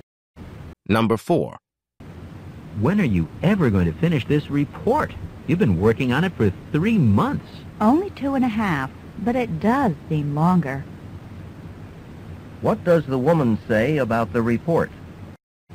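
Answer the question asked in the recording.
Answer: She has been working on it for 2.5 months, not 3.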